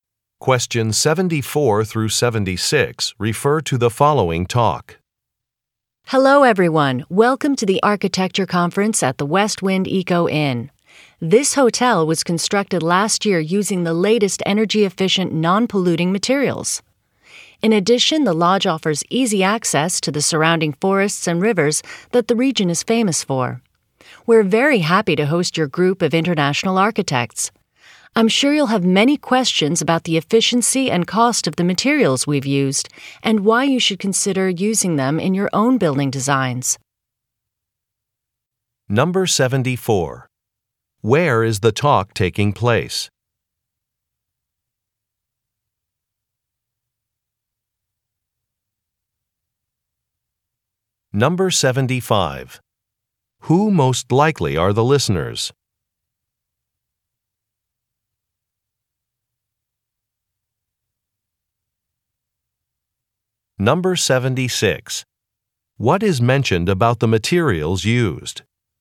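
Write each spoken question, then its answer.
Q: Where is the talk taking place?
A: At a hotel

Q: Who most likely are the listeners?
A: Architects

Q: What is mentioned about the materials used?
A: They are energy-efficient and non-polluting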